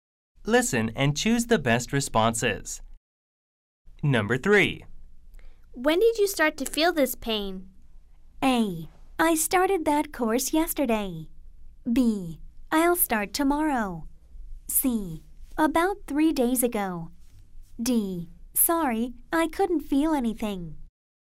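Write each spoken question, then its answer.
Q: When did you start to feel this pain?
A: C: About 3 days ago.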